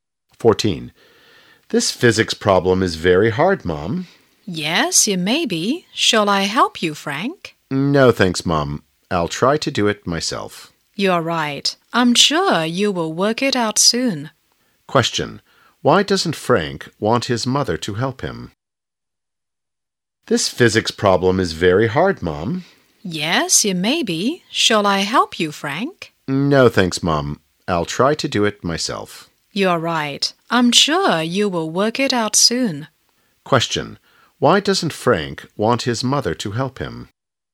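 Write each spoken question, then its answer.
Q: why doesn't Frank want his mother to help him?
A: He wants to try to do it himself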